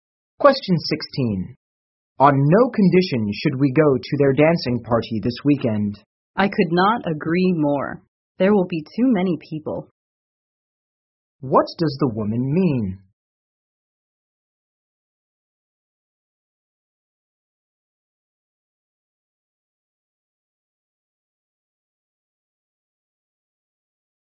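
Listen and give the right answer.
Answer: She agrees they should not go to the party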